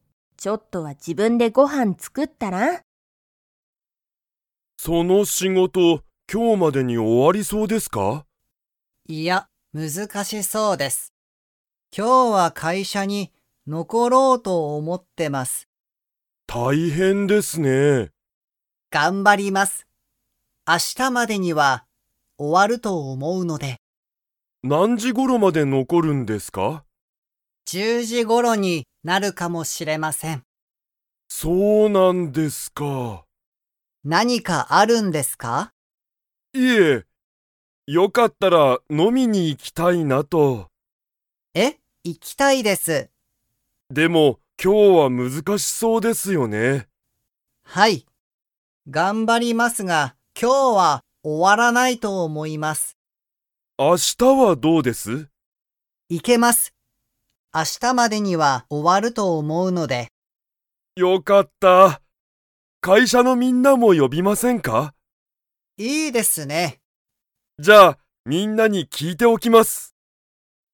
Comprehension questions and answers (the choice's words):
Comprehension Quiz (Skip if you don't understand the conversation yet)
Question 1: 有元(ありもと)さんは、その仕事(しごと)が今日(きょう)までに終(お)わりそうですか?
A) はい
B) いいえ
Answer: いいえ

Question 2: 野田(のだ)さんと有元(ありもと)さんは、____。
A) 今日飲(きょうの)みに行(い)く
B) 明日飲(あしたの)みに行(い)く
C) 飲(の)みに行(い)けない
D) いつも飲(の)みに行(い)く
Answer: 明日飲(あしたの)みに行(い)く

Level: Level 2